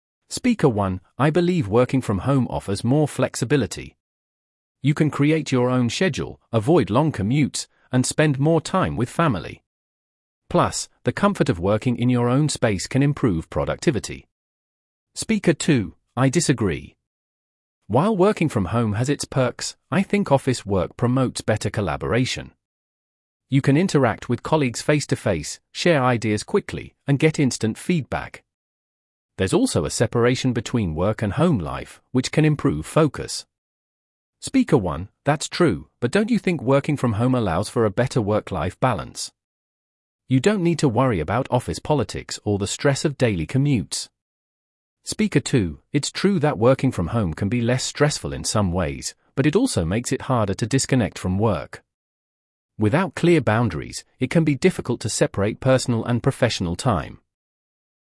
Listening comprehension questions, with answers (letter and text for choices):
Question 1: What is Speaker 1's viewpoint on working from home?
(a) It leads to more stress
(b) It improves work-life balance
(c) It makes collaboration easier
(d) It is less productive than office work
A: (b) It improves work-life balance

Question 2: What does Speaker 2 think is a benefit of working in an office?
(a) It provides more flexibility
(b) It helps avoid office politics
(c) It encourages better collaboration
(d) It reduces commuting time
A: (c) It encourages better collaboration

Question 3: What is Speaker 1's argument for working from home?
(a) It offers better collaboration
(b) It helps with work-life balance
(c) It provides a clearer separation between work and home life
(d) It is less stressful than working in an office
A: (b) It helps with work-life balance

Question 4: What is Speaker 2's concern about working from home?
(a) It makes work feel too personal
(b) It can make it difficult to disconnect from work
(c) It leads to too much commuting time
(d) It causes a lack of collaboration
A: (b) It can make it difficult to disconnect from work

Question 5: What does Speaker 1 think about the comfort of working from home?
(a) It makes work less productive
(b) It improves productivity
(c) It causes stress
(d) It leads to fewer breaks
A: (b) It improves productivity

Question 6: What does Speaker 2 believe is important for focus at work?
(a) Working from home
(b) A separation between work and home life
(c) Flexible hours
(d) Remote communication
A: (b) A separation between work and home life

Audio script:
Speaker 1: "I believe working from home offers more flexibility. You can create your own schedule, avoid long commutes, and spend more time with family. Plus, the comfort of working in your own space can improve productivity."
Speaker 2: "I disagree. While working from home has its perks, I think office work promotes better collaboration. You can interact with colleagues face-to-face, share ideas quickly, and get instant feedback. There's also a separation between work and home life, which can improve focus."
Speaker 1: "That's true, but don't you think working from home allows for a better work-life balance? You don't need to worry about office politics or the stress of daily commutes."
Speaker 2: "It's true that working from home can be less stressful in some ways, but it also makes it harder to disconnect from work. Without clear boundaries, it can be difficult to separate personal and professional time."